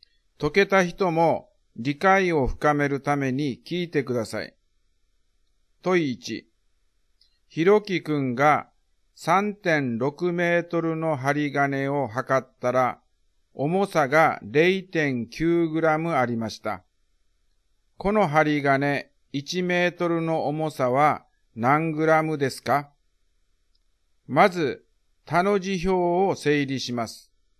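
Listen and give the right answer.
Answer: 0.25グラム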